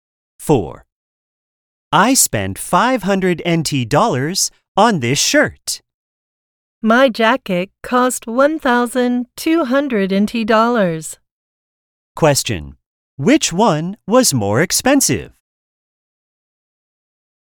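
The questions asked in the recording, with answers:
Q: Which one was more expensive?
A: The jacket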